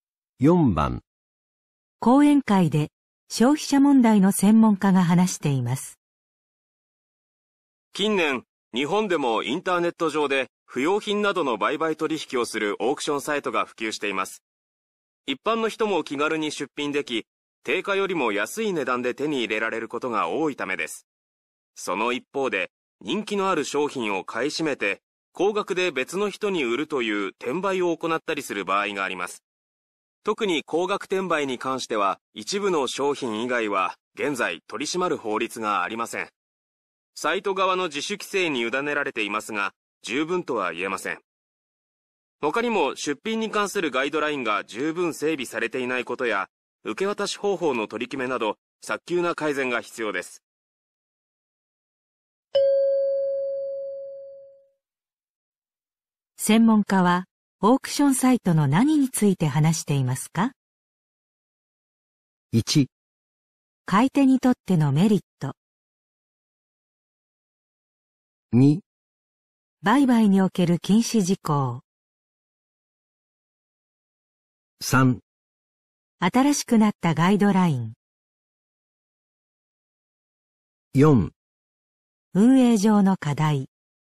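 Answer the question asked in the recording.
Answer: 4: 運営上の課題。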